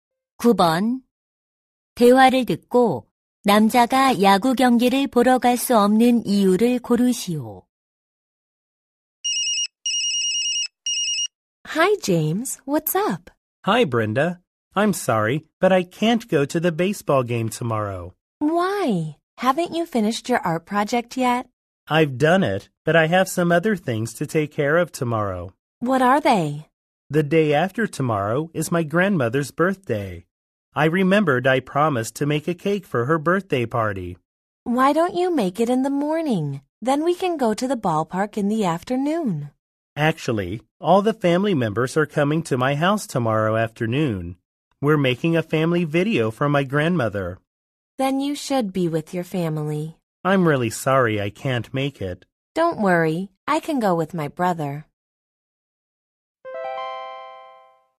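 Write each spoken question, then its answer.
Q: 대화를 듣고 남자가 야구 경기를 보러 갈 수 없는 이유를 고르시오.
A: 할머니를 위한 가족 영상을 만들어야 해서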